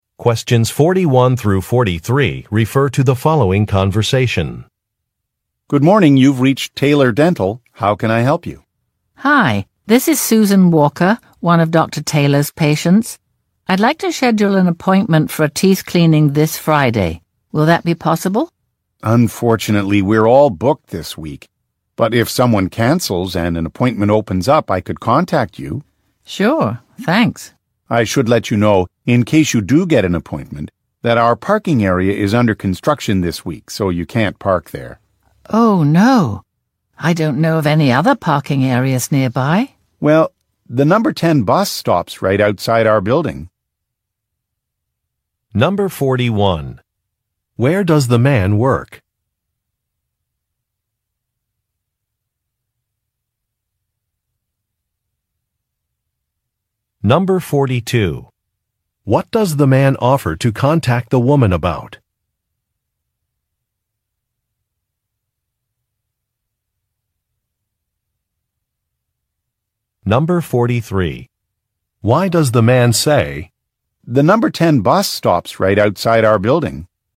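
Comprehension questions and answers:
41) Where does the man work?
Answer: At a dental office

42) What does the man offer to contact the woman about?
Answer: An appointment opening

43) Why does the man say, "the Number 10 bus stops right outside our building"?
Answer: To recommend that the woman take the bus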